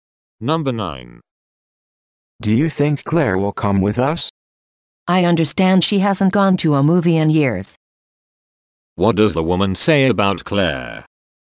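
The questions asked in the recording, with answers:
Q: What does the woman say about Claire?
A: She hasn't gone to a movie in years, so she may not come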